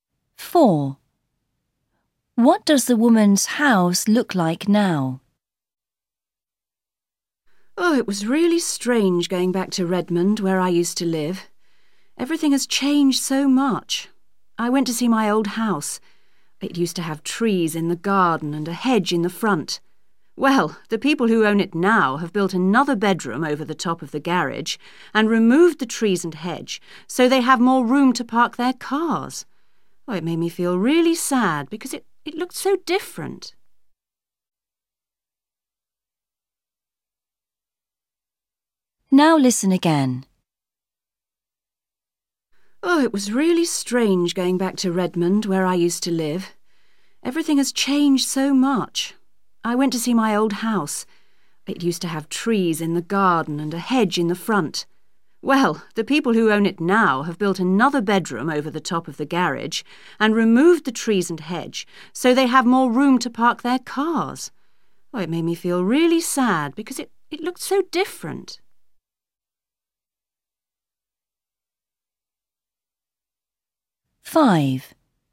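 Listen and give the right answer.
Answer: it has a bedroom over the garage and no trees or hedge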